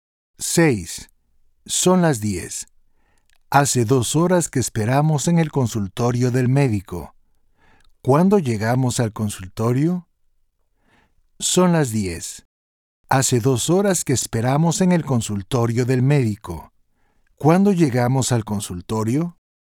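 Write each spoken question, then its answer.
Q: ¿Cuándo llegamos al consultorio?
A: a las 8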